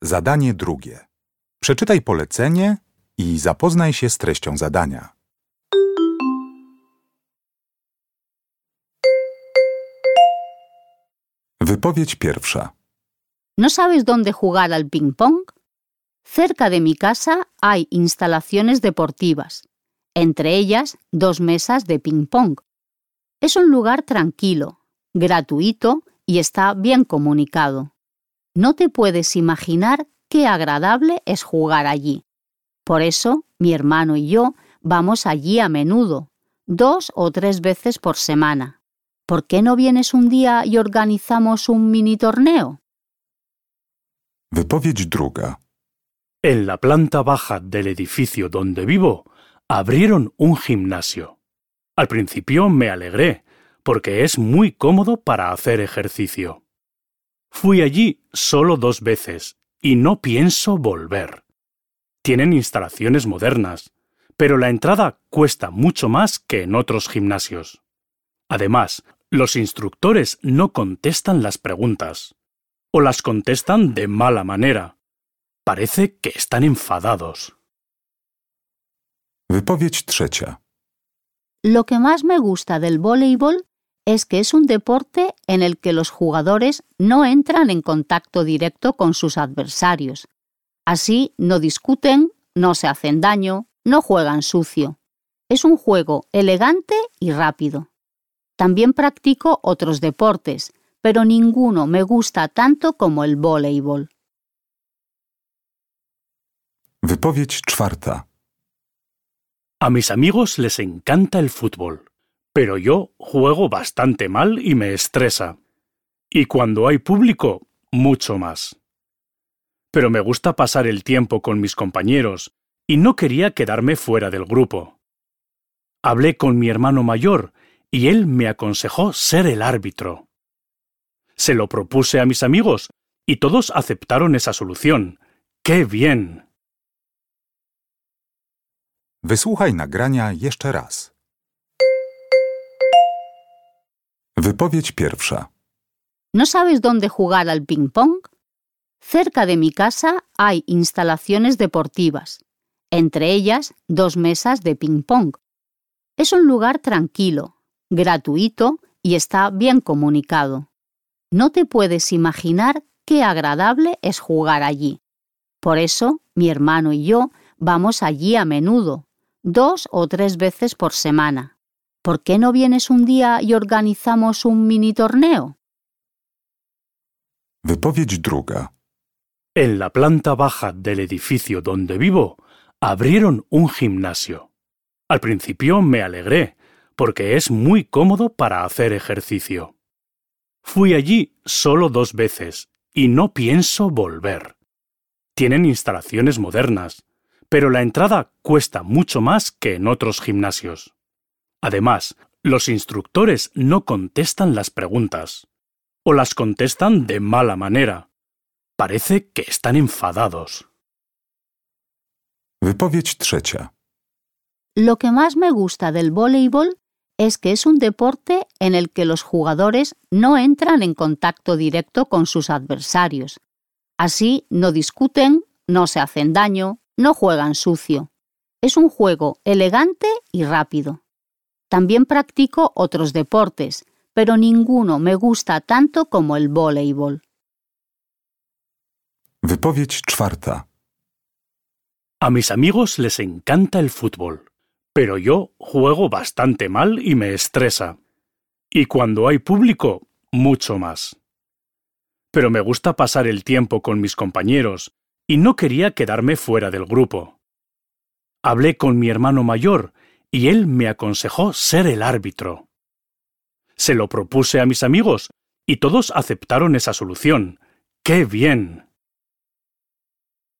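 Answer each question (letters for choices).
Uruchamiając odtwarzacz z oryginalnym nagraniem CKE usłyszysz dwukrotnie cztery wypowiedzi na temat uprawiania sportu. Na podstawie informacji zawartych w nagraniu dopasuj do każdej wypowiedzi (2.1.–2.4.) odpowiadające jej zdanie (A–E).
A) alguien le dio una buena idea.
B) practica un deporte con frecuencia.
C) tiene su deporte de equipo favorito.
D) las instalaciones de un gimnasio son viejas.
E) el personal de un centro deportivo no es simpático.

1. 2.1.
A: B

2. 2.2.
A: E

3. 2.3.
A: C

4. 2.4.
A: A

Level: ósmoklasisty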